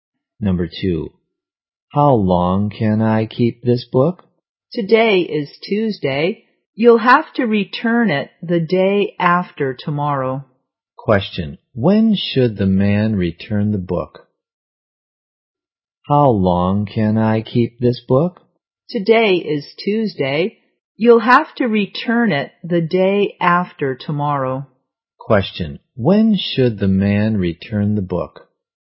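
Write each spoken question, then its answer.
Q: Question, when should the man return the book?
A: On Thursday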